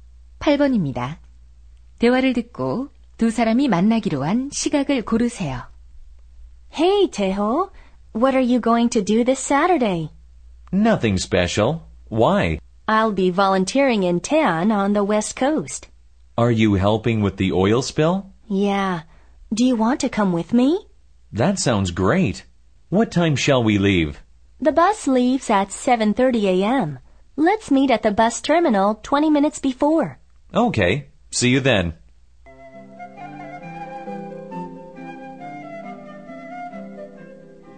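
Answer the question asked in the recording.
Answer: 오전 7시 10분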